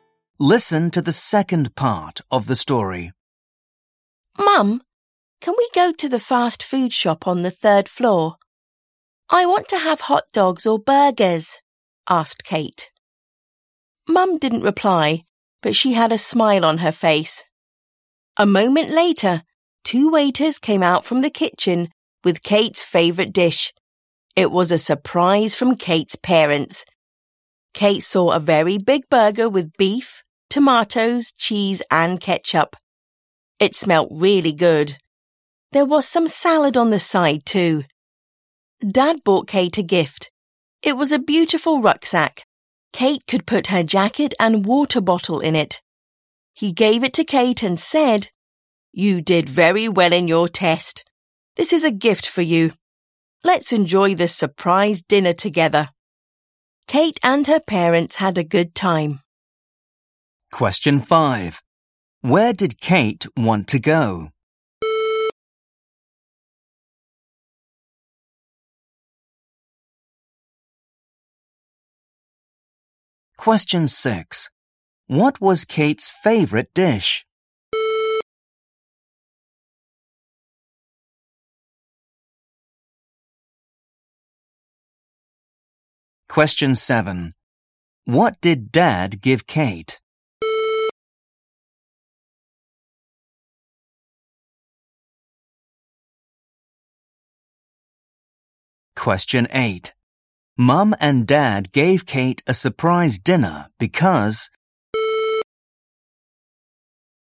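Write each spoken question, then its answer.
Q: Where did Kate want to go?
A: The fast food shop on the third floor

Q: What was Kate's favourite dish?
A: A big burger with beef, tomatoes, cheese and ketchup

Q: What did Dad give Kate?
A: A beautiful rucksack

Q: Mum and Dad gave Kate a surprise dinner because...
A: she did very well in her test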